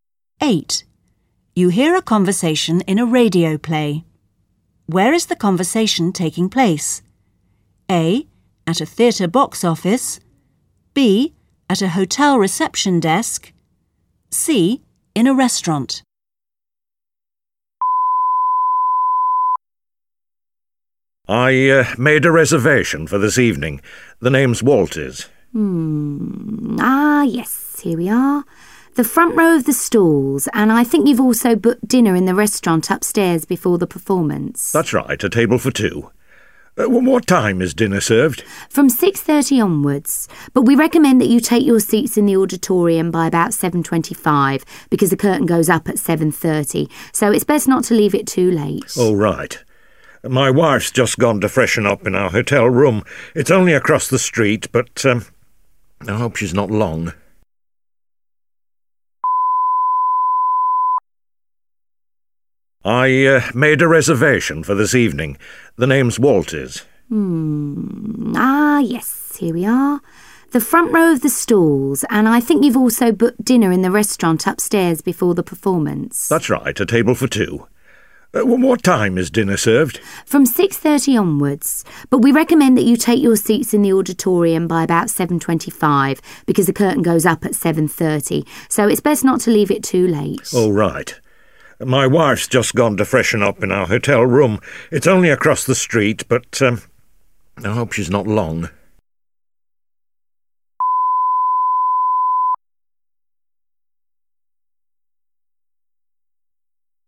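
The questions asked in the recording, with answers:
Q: Where is the conversation taking place?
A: A: At a theatre box office.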